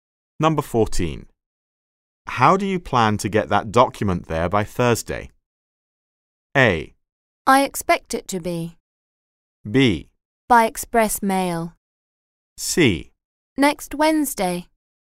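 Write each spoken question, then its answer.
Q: How do you plan to get that document there by Thursday?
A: B: By express mail.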